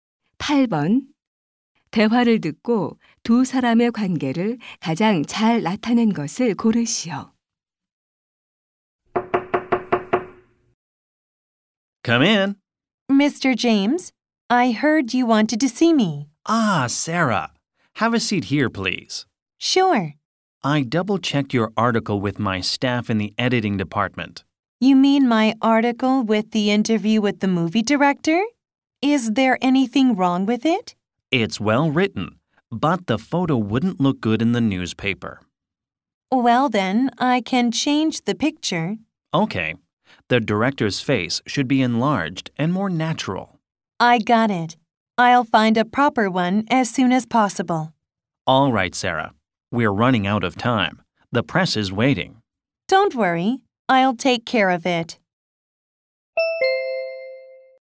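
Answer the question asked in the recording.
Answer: 신문 편집장과 기자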